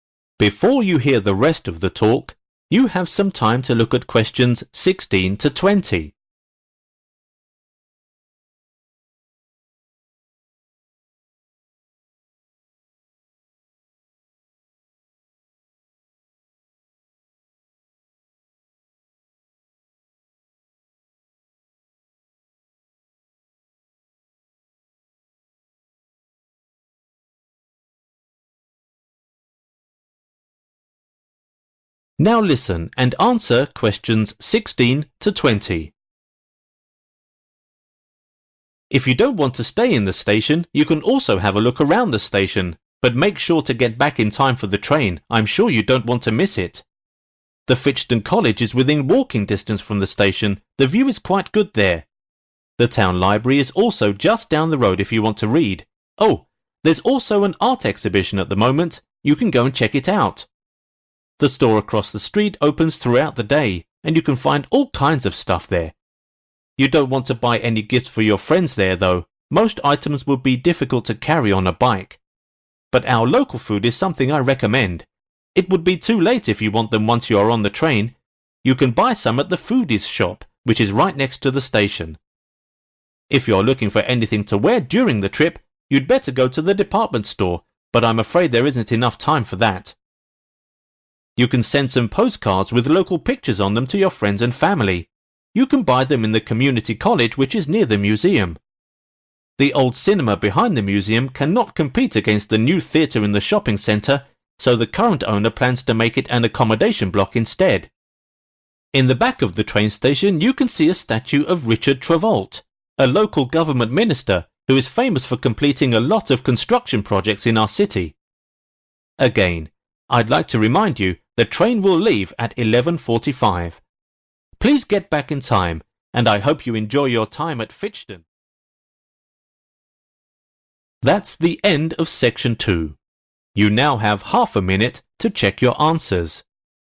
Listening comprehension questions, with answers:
Choose the correct letter, A, B or C.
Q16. Where could the passengers see the exhibition?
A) in the town library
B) in Fitchton college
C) in the station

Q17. What is the best gift for passengers to buy and bring home?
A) local food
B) clothing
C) jewelry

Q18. Where can passengers buy souvenir postcards?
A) in the museum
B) in the shop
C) in the college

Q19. What will the old cinema be converted to?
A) a housing area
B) a new theatre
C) a shop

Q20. Who is the statue in the train station modeled after?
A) a poet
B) an engineer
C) a politician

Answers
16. A
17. A
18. C
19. A
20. C

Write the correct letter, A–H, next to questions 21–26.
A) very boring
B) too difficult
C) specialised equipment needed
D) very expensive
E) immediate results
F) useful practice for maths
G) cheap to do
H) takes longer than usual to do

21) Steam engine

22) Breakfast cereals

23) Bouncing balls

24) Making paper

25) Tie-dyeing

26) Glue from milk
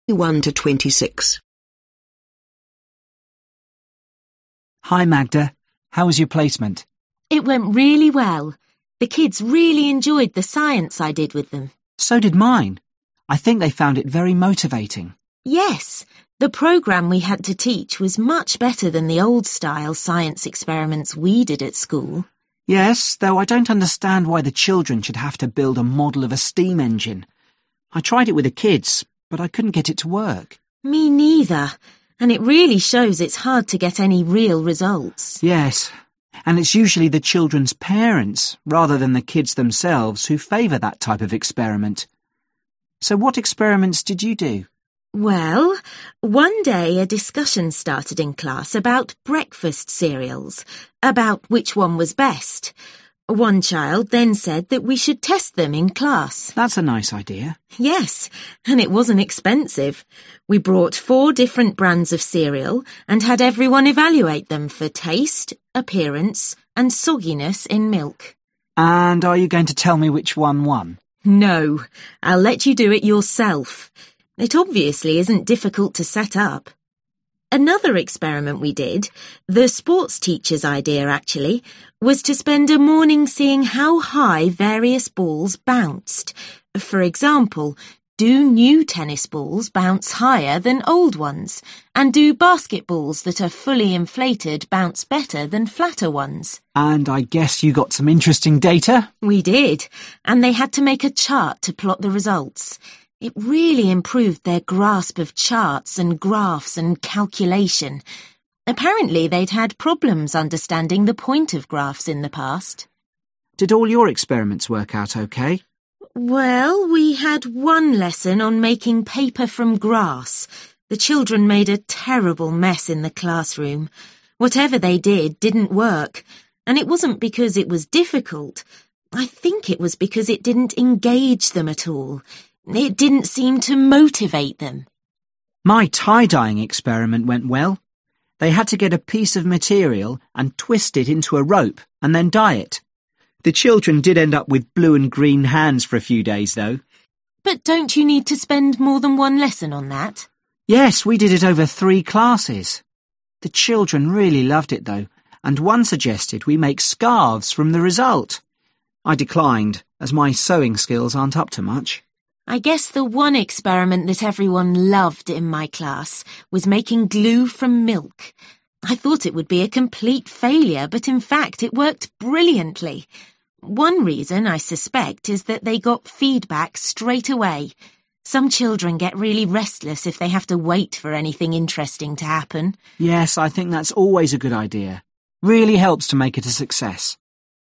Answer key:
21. B
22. G
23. F
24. A
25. H
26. E

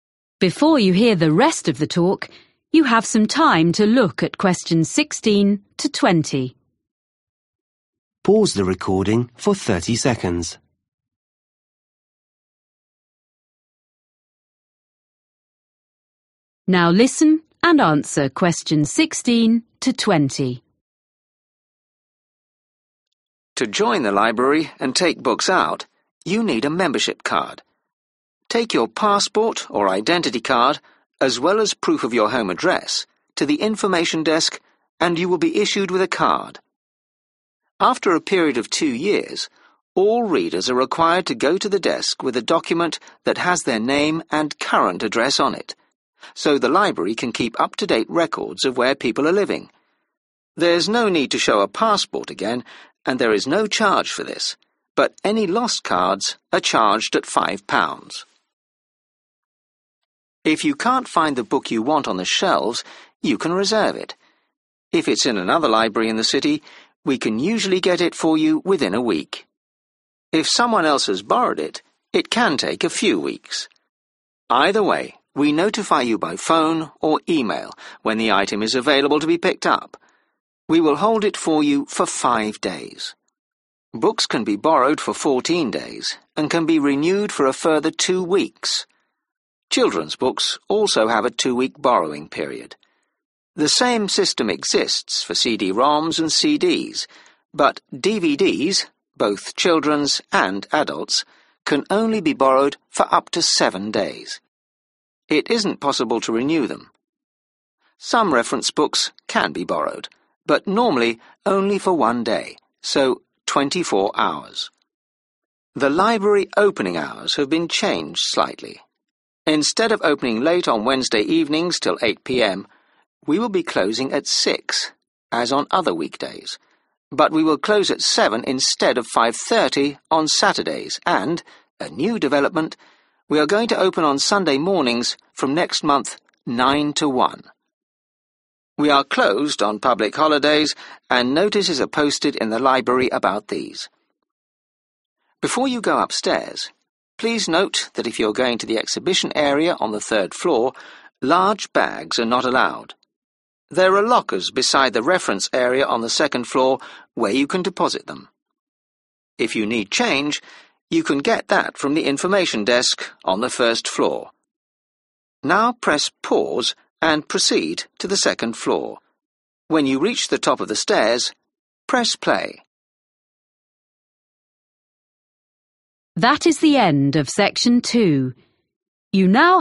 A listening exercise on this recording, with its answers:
Choose the correct answer.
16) After two years, library members have to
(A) show proof of their current address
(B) pay for a new membership card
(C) bring a passport or identity card into the library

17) What happens if you reserve a book?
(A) It will be available after five days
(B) You can collect it a week later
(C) You will be contacted when it is available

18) Which materials can be borrowed for one week only?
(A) some reference books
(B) CD-ROMs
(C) children's DVDs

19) On which day does the library stay open later than it used to?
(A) Wednesday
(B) Saturday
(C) Sunday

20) Large bags should be left on the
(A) first floor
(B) second floor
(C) third floor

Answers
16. A
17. C
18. C
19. B
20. B

